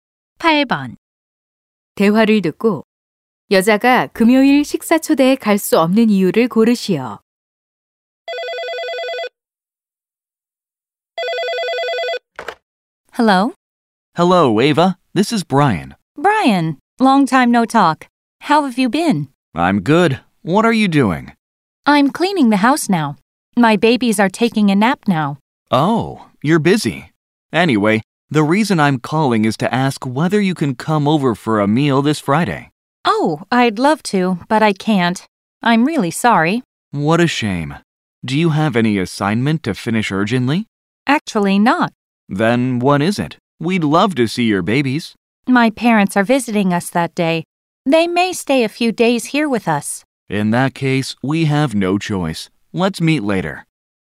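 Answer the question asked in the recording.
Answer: 부모님이 방문하시기 때문에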